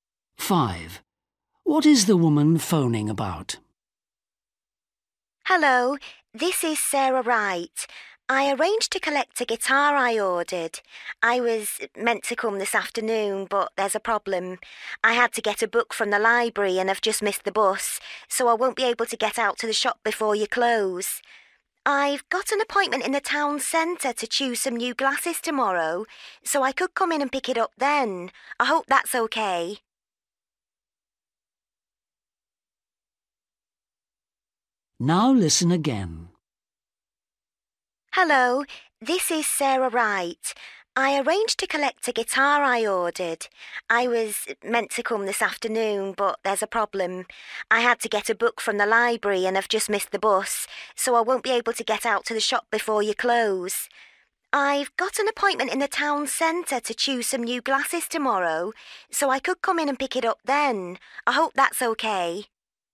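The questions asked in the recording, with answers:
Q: What is the woman phoning about?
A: collecting a guitar she ordered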